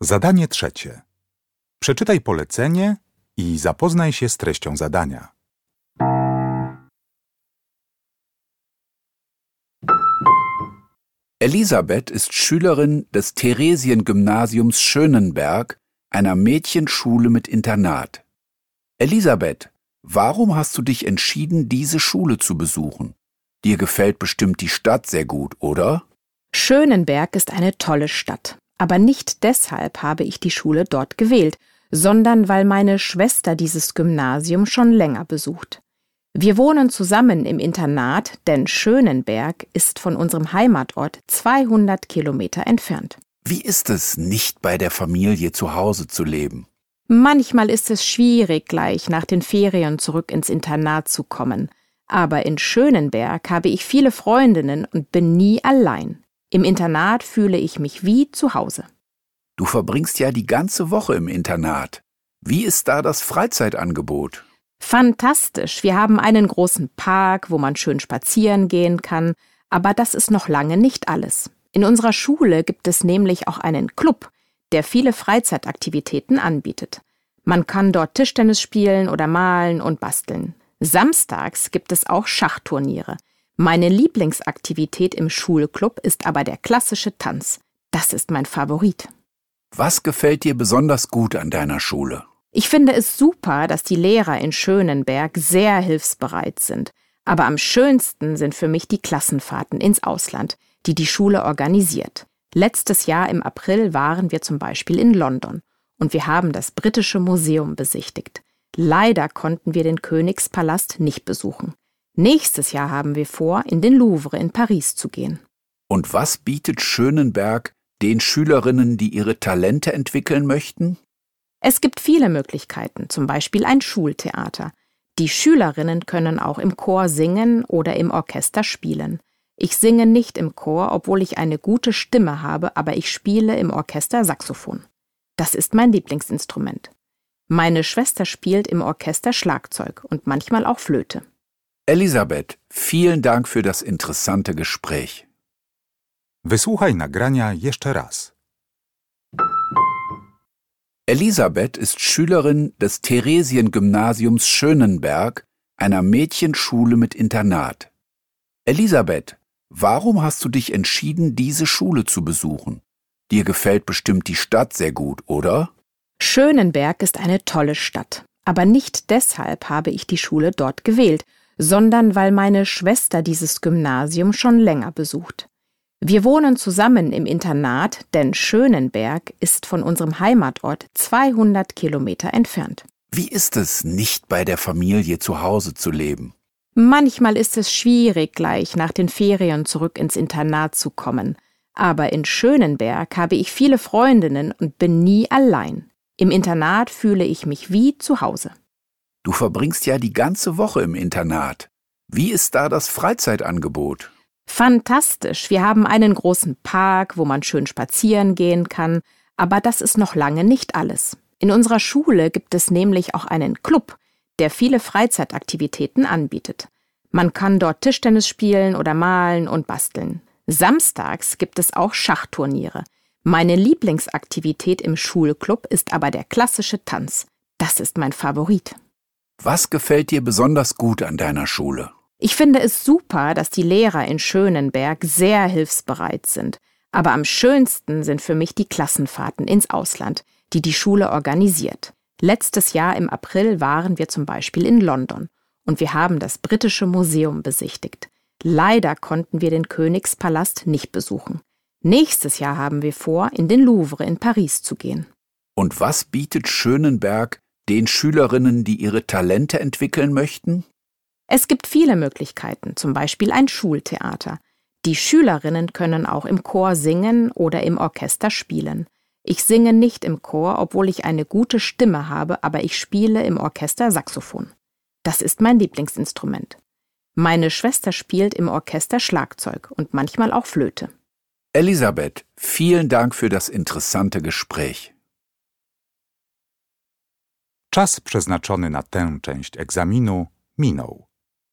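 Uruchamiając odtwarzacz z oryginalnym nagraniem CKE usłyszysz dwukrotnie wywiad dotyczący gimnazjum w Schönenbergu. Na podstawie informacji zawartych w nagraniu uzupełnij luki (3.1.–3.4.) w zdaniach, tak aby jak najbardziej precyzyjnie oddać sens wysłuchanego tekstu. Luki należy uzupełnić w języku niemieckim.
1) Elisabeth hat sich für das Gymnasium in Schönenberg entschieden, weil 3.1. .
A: ihre Schwester dieses Gymnasium schon länger besucht

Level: Poziom: podstawowy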